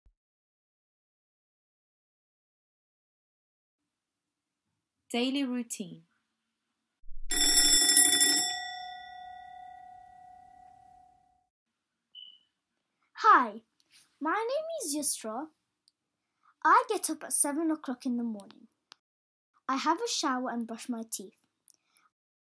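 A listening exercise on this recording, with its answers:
4- Watch the video – listen and write.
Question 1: " I __________ up at 7 o'clock in the morning"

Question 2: "I __________ a shower and __________ my teeth".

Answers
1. get
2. have; brush

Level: Beginners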